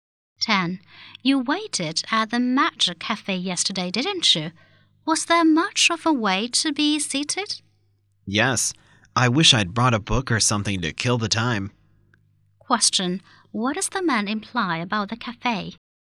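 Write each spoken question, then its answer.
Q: What does the man imply about the cafe?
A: He had to wait a long time to get a seat.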